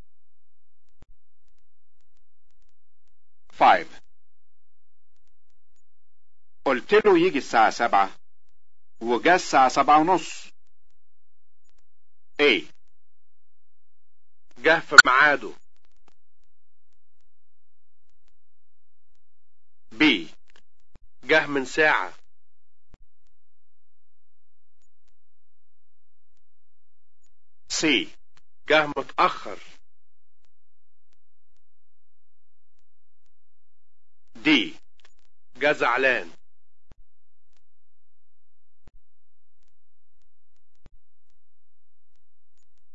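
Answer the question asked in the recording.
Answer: C: جه متأخر.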